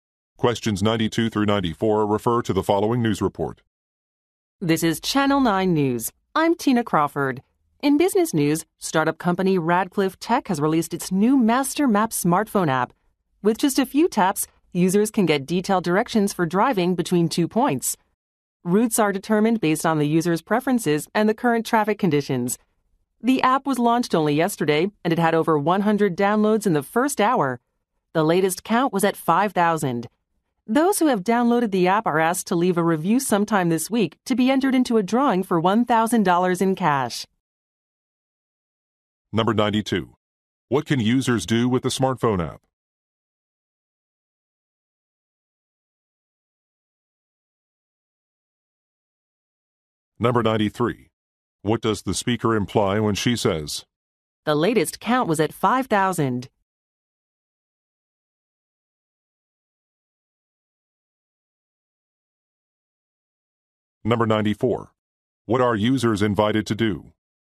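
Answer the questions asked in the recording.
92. Get driving directions
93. The app has become very popular quickly
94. Leave a review to enter a cash drawing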